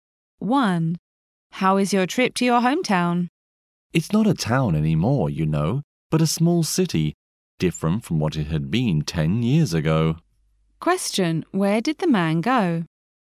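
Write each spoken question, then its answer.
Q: Where did the man go?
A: His hometown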